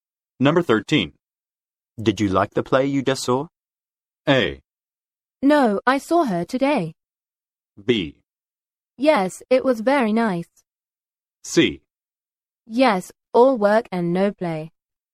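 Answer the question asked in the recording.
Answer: B: Yes, it was very nice.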